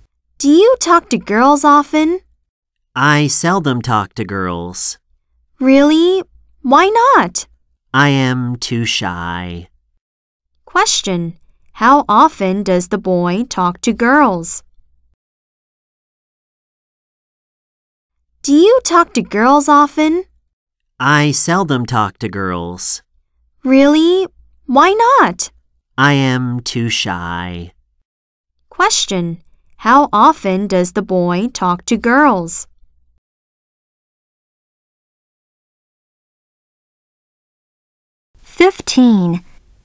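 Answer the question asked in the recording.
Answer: Seldom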